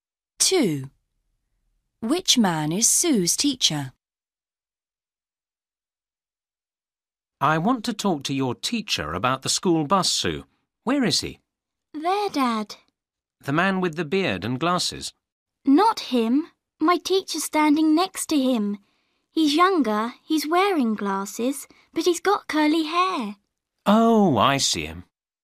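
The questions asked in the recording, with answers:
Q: Which man is Sue's teacher?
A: The younger man with glasses and curly hair, next to the man with the beard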